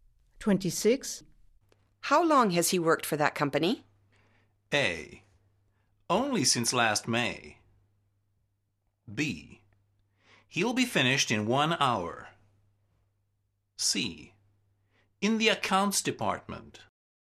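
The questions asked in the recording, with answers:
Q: How long has he worked for that company?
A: A: Only since last May.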